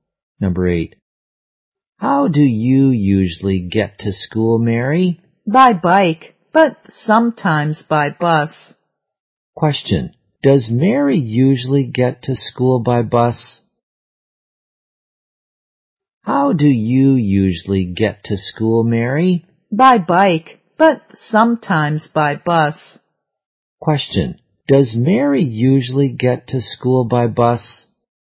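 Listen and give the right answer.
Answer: No, she usually goes by bike.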